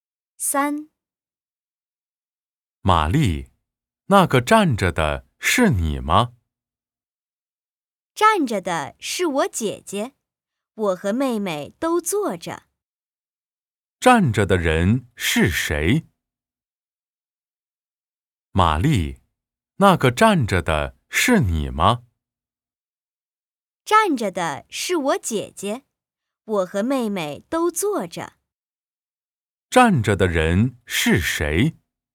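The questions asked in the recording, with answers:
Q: 站着的人是谁?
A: 玛丽的姐姐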